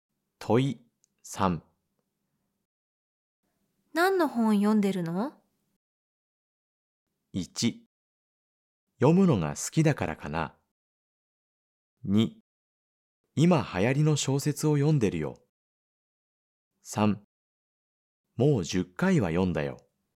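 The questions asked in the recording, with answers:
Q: 何の本読んでるの?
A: 2: 今流行りの小説を読んでるよ。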